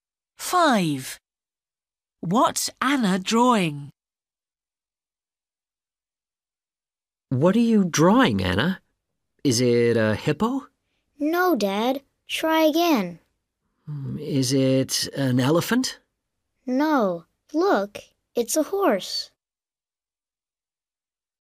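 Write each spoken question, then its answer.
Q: What's Anna drawing?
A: a horse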